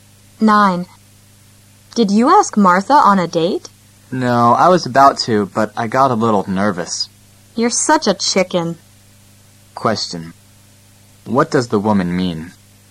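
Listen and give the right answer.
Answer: The man is a coward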